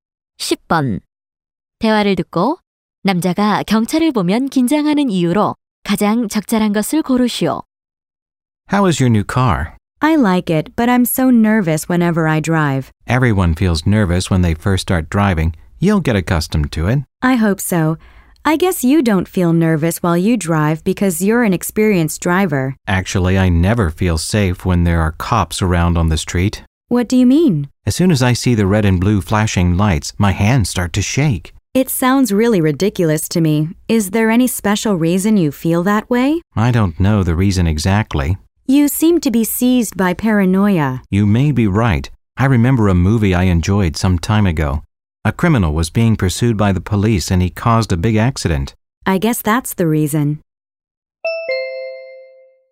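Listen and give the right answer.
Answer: 예전에 본 영화에서 경찰에 쫓기던 범죄자가 큰 사고를 냈기 때문에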